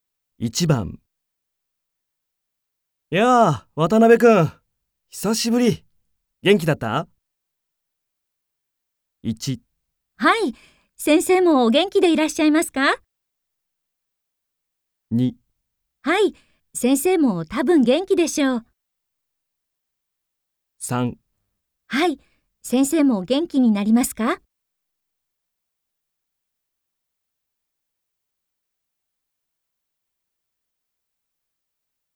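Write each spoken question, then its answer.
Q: やあ、渡辺君、久しぶり。元気だった?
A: 1: はい、先生もお元気でいらっしゃいますか?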